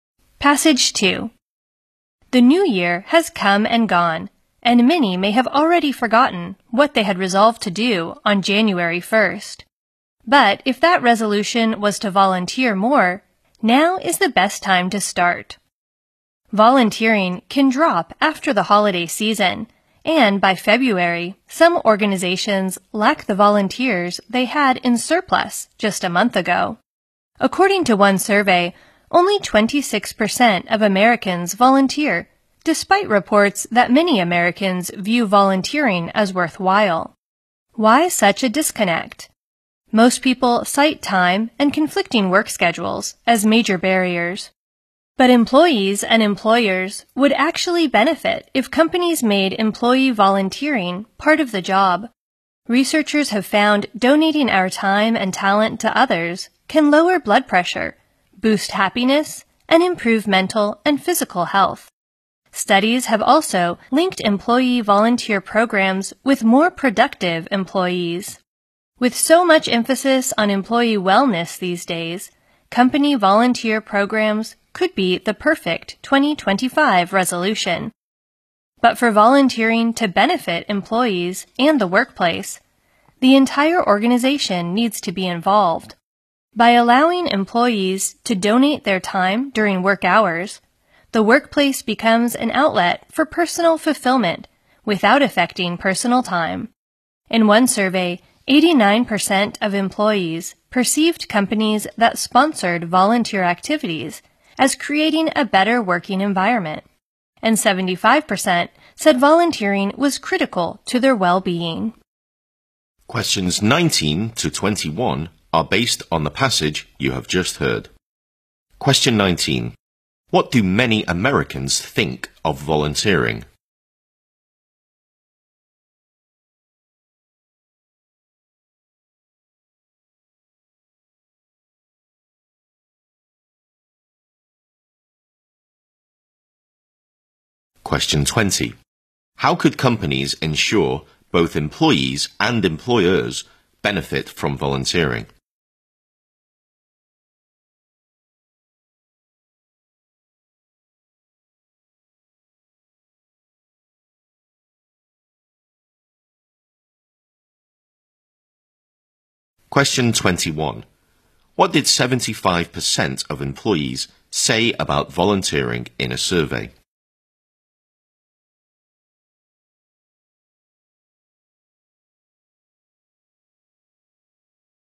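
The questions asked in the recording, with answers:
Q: What do many Americans think of volunteering?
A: It is worthwhile

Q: How could companies ensure both employees and employers benefit from volunteering?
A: By making volunteering part of the job, allowing it during work hours

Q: What did 75% of employees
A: Volunteering was critical to their well-being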